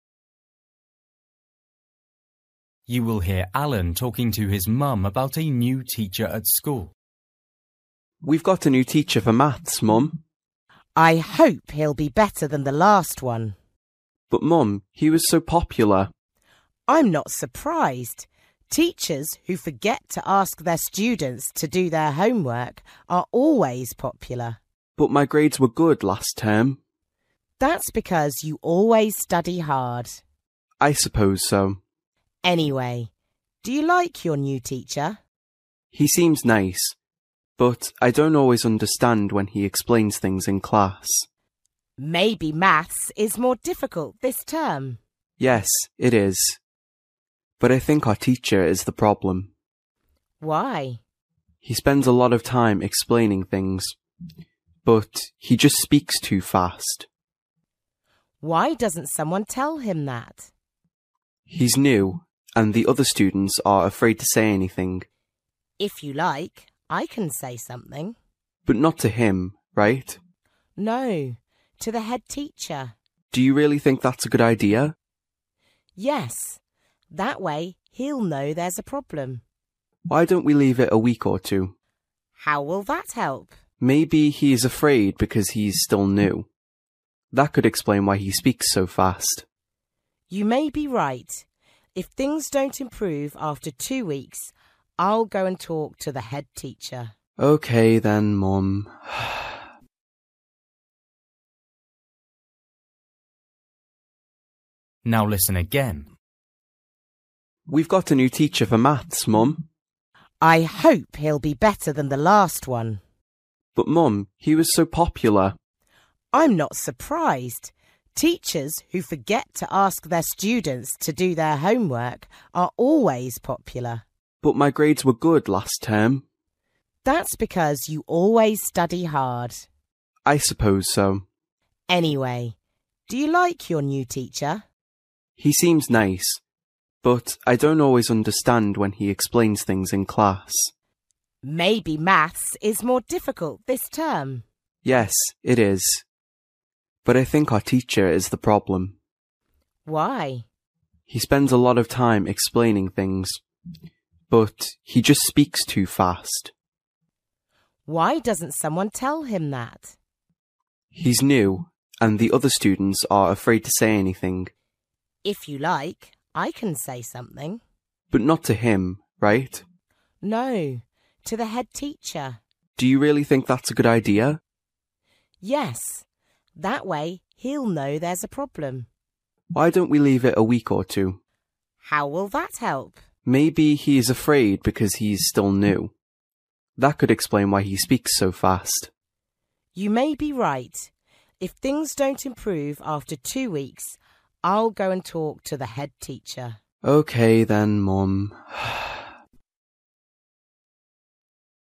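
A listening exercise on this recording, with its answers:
For each question, choose the correct answer.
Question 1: What did Alan's mum think about his old teacher?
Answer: He didn't make students do homework (she didn't like him).

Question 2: What is Alan's problem now?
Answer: The new teacher speaks too fast, so he doesn't understand.

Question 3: Alan's mum is surprised that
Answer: nobody tells the teacher he speaks too fast

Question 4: Who does Alan's mum want to speak to?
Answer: the head teacher

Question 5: Alan thinks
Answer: they should wait a week or two because the teacher is new

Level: Luyện nghe trình độ A2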